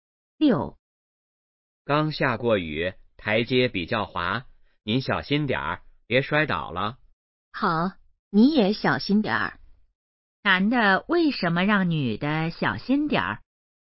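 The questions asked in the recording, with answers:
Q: 男的为什么让女的小心点儿?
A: 台阶比较滑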